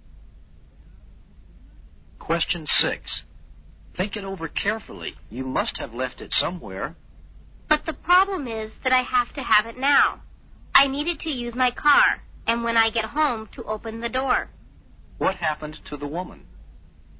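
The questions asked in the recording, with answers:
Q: What happened to the woman?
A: She lost her keys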